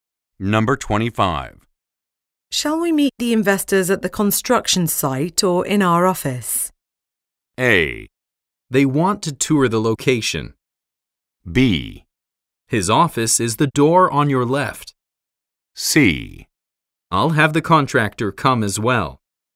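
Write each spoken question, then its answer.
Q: Shall we meet the investors at the construction site or in our office?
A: A: They want to tour the location.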